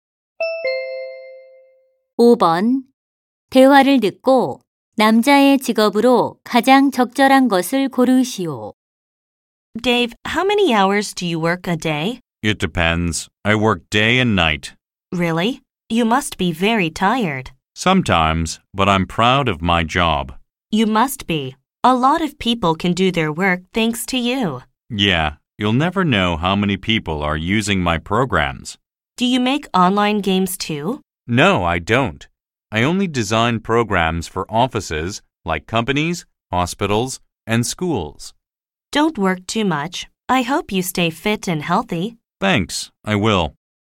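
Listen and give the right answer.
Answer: 컴퓨터 프로그램 개발자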